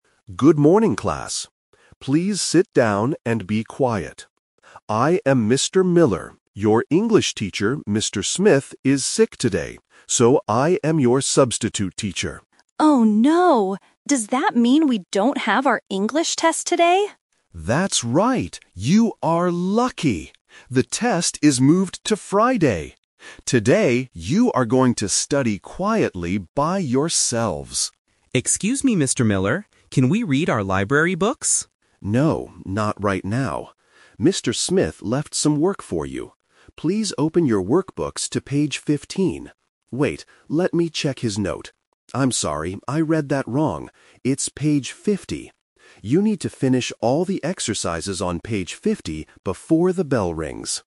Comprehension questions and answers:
Listen to a substitute teacher talking to the class. Select the best option (A, B, or C) for each of the following questions.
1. Why is Mr. Miller in the classroom today?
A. He is giving the students an English test.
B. The regular English teacher is sick.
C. He is the new library teacher.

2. When are the students going to take their English test?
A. Today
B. On Friday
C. Next week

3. What page do the students need to do in their workbooks?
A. Page 15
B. Page 50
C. Page 55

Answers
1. B. The regular English teacher is sick.
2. B. On Friday
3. B. Page 50

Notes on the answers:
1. Mr. Miller introduces himself and says, "Your English teacher, Mr. Smith, is sick today, so I am your substitute teacher." Why the traps are wrong: Option (A) is "The Trap". An English test is mentioned, but Mr. Miller is not giving it today. Option (C) is a "Plausible Trap". A student asks about reading library books, but Mr. Miller is not a library teacher.
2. Mr. Miller explicitly states the new plan: "The test is moved to Friday." Why the traps are wrong: Option (A) is "The Twist Trap". The students were supposed to have the test today, but it was moved because Mr. Smith is sick. Option (C) is a plausible time for a delayed test, but it is not mentioned in the audio.
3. Mr. Miller checks the note again and corrects himself: "I'm sorry, I read that wrong. It's page 50." Why the traps are wrong: Option (A) is "The Twist Trap". Mr. Miller says page 15 first, but immediately realizes he made a mistake. Option (C) is a "Phonetic Trap" (15 / 50 / 55 sound similar), designed to test if students can hear the clear difference between -teen and -ty sounds.

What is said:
Mr. Miller: Good morning, class. Please sit down and be quiet. I am Mr. Miller. Your English teacher, Mr. Smith, is sick today, so I am your substitute teacher.
Student 1 (Girl): Oh, no. Does that mean we don't have our English test today?
Mr. Miller: That's right. You are lucky! The test is moved to Friday. Today, you are going to study quietly by yourselves.
Student 2 (Boy): Excuse me, Mr. Miller. Can we read our library books?
Mr. Miller: No, not right now. Mr. Smith left some work for you. Please open your workbooks to page 15... wait, let me check his note. I'm sorry, I read that wrong. It's page 50. You need to finish all the exercises on page 50 before the bell rings.

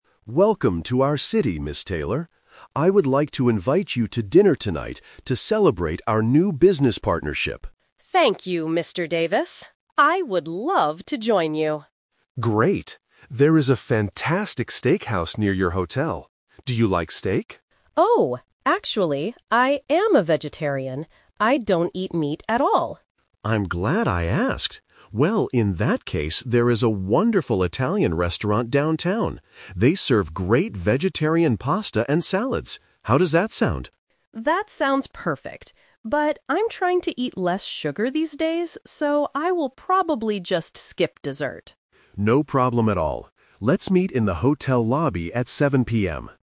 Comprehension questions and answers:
Listen to the conversation between a director and a client, and choose the correct answer (A, B, or C) for each question.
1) Where are they going to eat dinner?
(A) A steakhouse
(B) An Italian restaurant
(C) A seafood restaurant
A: (B) An Italian restaurant

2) Why can't Ms. Taylor eat at the first restaurant Mr. Davis suggests?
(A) She doesn't eat meat.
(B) She is allergic to seafood.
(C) It is too far from her hotel.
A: (A) She doesn't eat meat.

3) What will Ms. Taylor probably NOT eat tonight?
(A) Pasta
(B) Salad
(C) Dessert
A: (C) Dessert

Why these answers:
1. They agree to go to an Italian restaurant because it has vegetarian options. Option (A) is the trap; Mr. Davis suggests a steakhouse first, but they change the plan. Option (C) is a plausible type of restaurant but is never mentioned.
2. When Mr. Davis suggests a steakhouse, Ms. Taylor says, "I am a vegetarian. I don't eat meat at all." Option (B) is a trap; it is a common food allergy, but it is not mentioned here. Option (C) is also a trap; the steakhouse is actually "near" her hotel, not far from it.
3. Ms. Taylor says, "I'm trying to eat less sugar these days, so I will probably just skip dessert." Options (A) and (B) are traps because pasta and salads are the foods she will likely eat at the Italian restaurant.

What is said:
Mr. Davis: Welcome to our city, Ms. Taylor. I would like to invite you to dinner tonight to celebrate our new business partnership.
Ms. Taylor: Thank you, Mr. Davis. I would love to join you.
Mr. Davis: Great. There is a fantastic steakhouse near your hotel. Do you like steak?
Ms. Taylor: Oh, actually, I am a vegetarian. I don't eat meat at all.
Mr. Davis: I'm glad I asked! Well, in that case, there is a wonderful Italian restaurant downtown. They serve great vegetarian pasta and salads. How does that sound?
Taylor: That sounds perfect. But I'm trying to eat less sugar these days, so I will probably just skip dessert.

